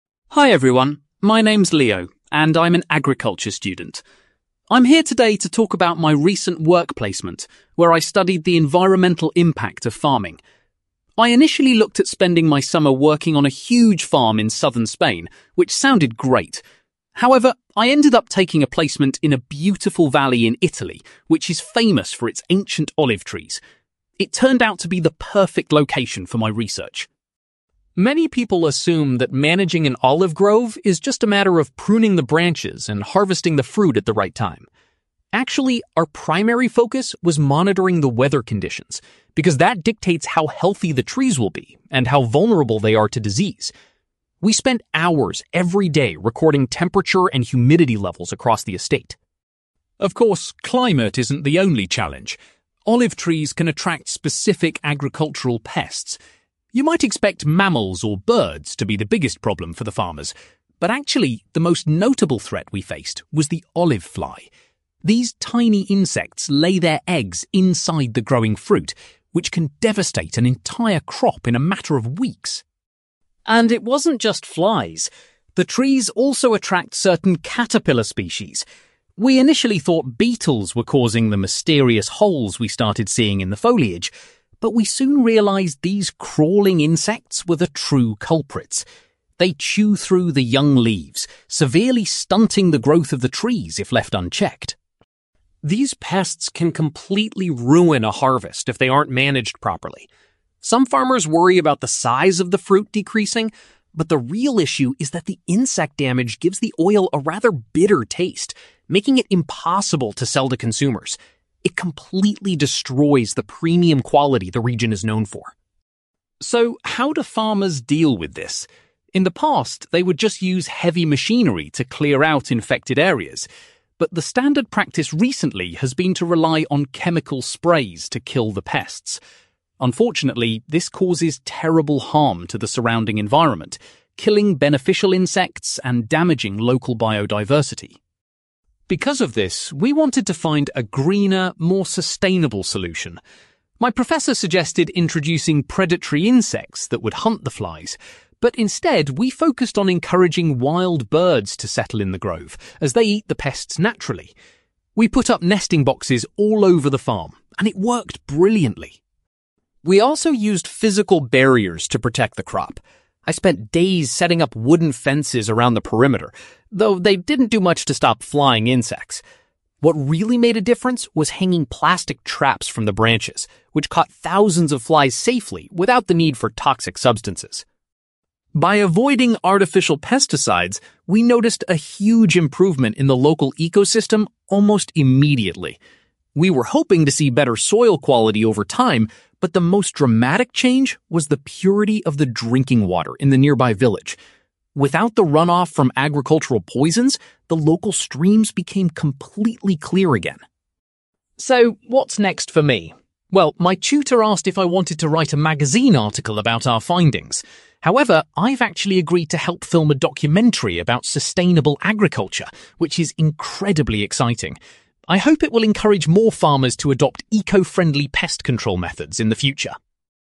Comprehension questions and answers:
You will hear an agriculture student called Leo giving a presentation about his work placement on an olive farm. For questions 9-18, complete the sentences with a word or short phrase.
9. Leo did his work placement in a (9)........................... in Italy.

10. Leo's team spent most of their time checking the (10)........................... in the olive grove.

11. Leo explains that the (11)........................... is the most significant pest affecting the trees.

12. Leo discovered that damage to the leaves was being caused by a number of (12)........................... .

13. Leo says that pest damage can result in the oil having a (13)........................... .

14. Leo criticises the use of (14)........................... because of the damage they do to nature.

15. Leo's team decided to attract (15)........................... to the area to help control the pest population.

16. Leo found that attaching (16)........................... to the trees was a highly effective measure.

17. The natural farming methods improved the quality of the (17)........................... for local people.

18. Leo is looking forward to working on a (18)........................... about eco-friendly farming.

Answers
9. valley
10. weather conditions
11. olive fly
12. caterpillar species
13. bitter taste
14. chemical sprays
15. wild birds
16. plastic traps
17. drinking water
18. documentary

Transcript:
Leo: Hi everyone. My name is Leo, and I'm an agriculture student. I'm here today to talk about my recent work placement, where I studied the environmental impact of farming. I initially looked at spending my summer working on a huge farm in southern Spain, which sounded great. However, I ended up taking a placement in a beautiful valley in Italy, which is famous for its ancient olive trees. It turned out to be the perfect location for my research.
Many people assume that managing an olive grove is just a matter of pruning the branches and harvesting the fruit at the right time. Actually, our primary focus was monitoring the weather conditions, because that dictates how healthy the trees will be and how vulnerable they are to disease. We spent hours every day recording temperature and humidity levels across the estate.
Of course, climate isn't the only challenge. Olive trees can attract specific agricultural pests. You might expect mammals or birds to be the biggest problem for the farmers, but actually, the most notable threat we faced was the olive fly. These tiny insects lay their eggs inside the growing fruit, which can devastate an entire crop in a matter of weeks.
And it wasn't just flies. The trees also attract certain caterpillar species. We initially thought beetles were causing the mysterious holes we started seeing in the foliage, but we soon realised these crawling insects were the true culprits. They chew through the young leaves, severely stunting the growth of the trees if left unchecked.
These pests can completely ruin a harvest if they aren't managed properly. Some farmers worry about the size of the fruit decreasing, but the real issue is that the insect damage gives the oil a rather bitter taste, making it impossible to sell to consumers. It completely destroys the premium quality the region is known for.
So, how do farmers deal with this? In the past, they would just use heavy machinery to clear out infected areas. But the standard practice recently has been to rely on chemical sprays to kill the pests. Unfortunately, this causes terrible harm to the surrounding environment, killing beneficial insects and damaging local biodiversity.
Because of this, we wanted to find a greener, more sustainable solution. My professor suggested introducing predatory insects that would hunt the flies, but instead we focused on encouraging wild birds to settle in the grove, as they eat the pests naturally. We put up nesting boxes all over the farm, and it worked brilliantly.
We also used physical barriers to protect the crop. I spent days setting up wooden fences around the perimeter, though they didn't do much to stop flying insects! What really made a difference was hanging plastic traps from the branches, which caught thousands of flies safely without the need for toxic substances.
By avoiding artificial pesticides, we noticed a huge improvement in the local ecosystem almost immediately. We were hoping to see better soil quality over time, but the most dramatic change was the purity of the drinking water in the nearby village. Without the runoff from agricultural poisons, the local streams became completely clear again.
So, what's next for me? Well, my tutor asked if I wanted to write a magazine article about our findings. However, I've actually agreed to help film a documentary about sustainable agriculture, which is incredibly exciting. I hope it will encourage more farmers to adopt eco-friendly pest control methods in the future.

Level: B2